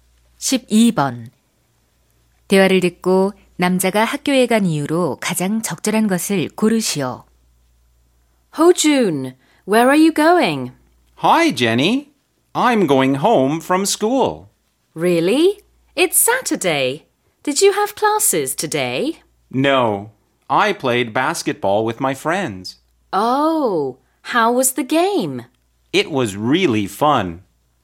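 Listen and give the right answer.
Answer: 친구들과 농구를 하려고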